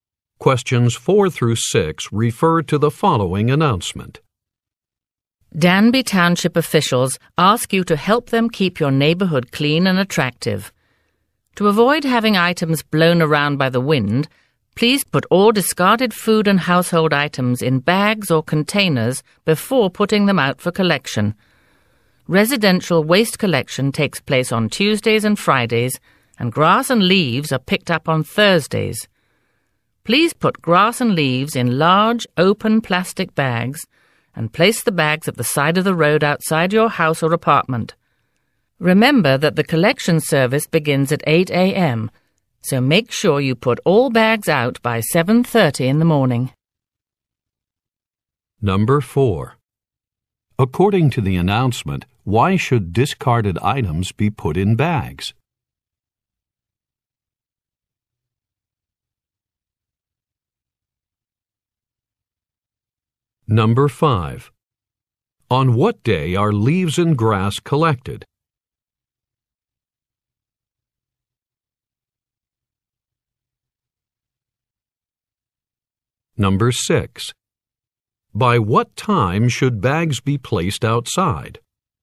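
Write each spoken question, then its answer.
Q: According to the announcement, why should discarded items be put in bags?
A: To keep them from being blown around by the wind

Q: On what day are leaves and grass collected?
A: Thursday

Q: By what time should bags be placed outside?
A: 7:30 a.m.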